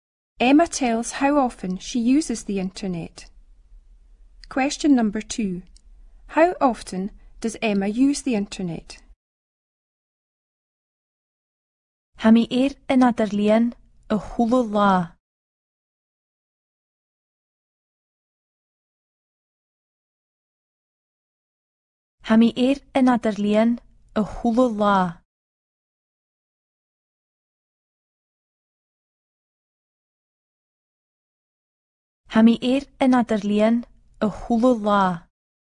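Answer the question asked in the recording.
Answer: Every day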